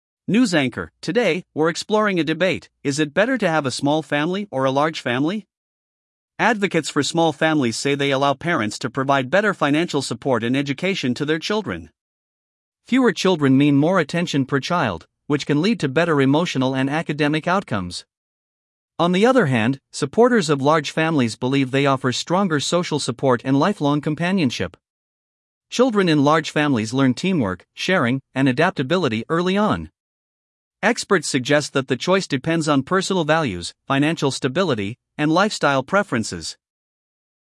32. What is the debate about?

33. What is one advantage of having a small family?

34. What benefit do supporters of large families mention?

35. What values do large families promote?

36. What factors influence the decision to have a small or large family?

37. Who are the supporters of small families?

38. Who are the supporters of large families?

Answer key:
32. Family size debate
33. Better financial support and attention
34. Social support and companionship
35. Teamwork, sharing, adaptability
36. Values, finances, lifestyle
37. Small-family advocates
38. Large-family supporters

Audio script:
News Anchor: Today, we're exploring a debate: is it better to have a small family or a large family?
Advocates for small families say they allow parents to provide better financial support and education to their children. Fewer children mean more attention per child, which can lead to better emotional and academic outcomes.
On the other hand, supporters of large families believe they offer stronger social support and lifelong companionship. Children in large families learn teamwork, sharing, and adaptability early on.
Experts suggest that the choice depends on personal values, financial stability, and lifestyle preferences.